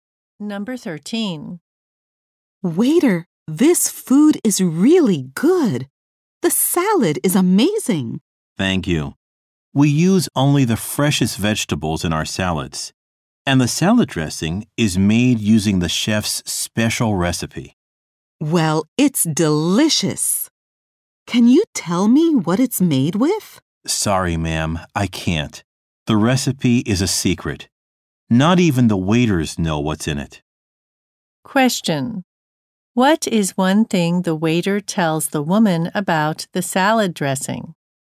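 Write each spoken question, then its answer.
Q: What is one thing the waiter tells the woman about the salad dressing?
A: Its recipe is a secret.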